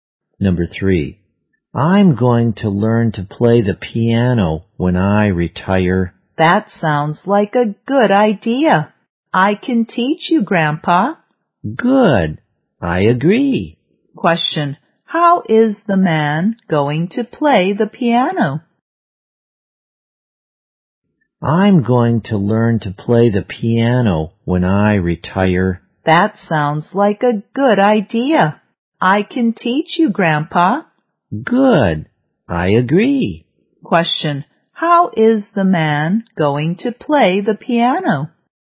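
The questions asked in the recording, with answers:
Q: how is the man going to play the piano?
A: His grandchild will teach him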